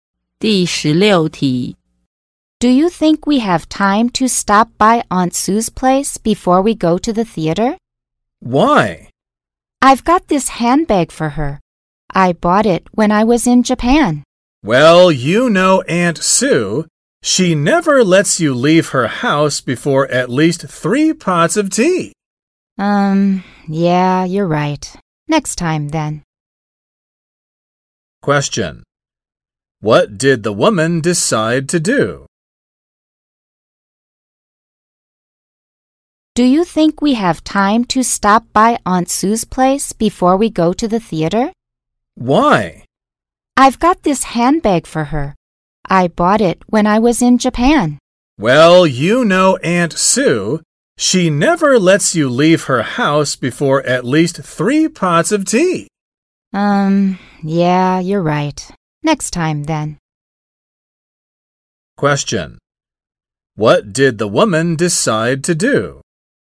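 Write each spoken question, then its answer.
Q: What did the woman decide to do?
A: Not visit Aunt Sue before the theater; visit her next time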